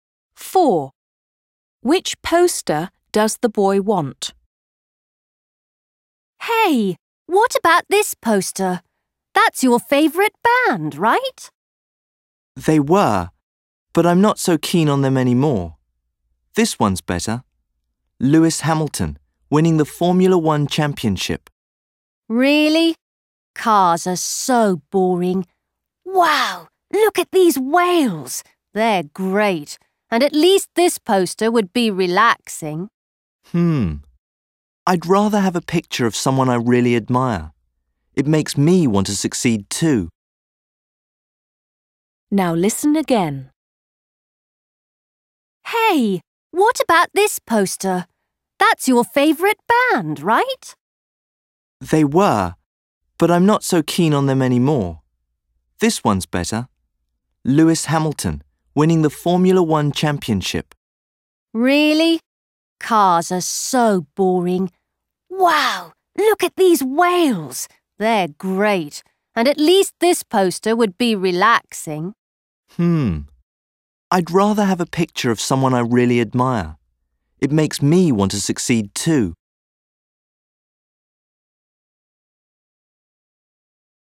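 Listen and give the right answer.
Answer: The Lewis Hamilton poster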